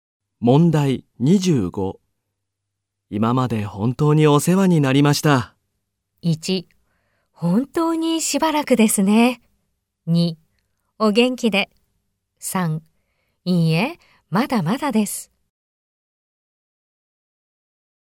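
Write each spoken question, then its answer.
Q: 今まで本当にお世話になりました。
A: 2: お元気で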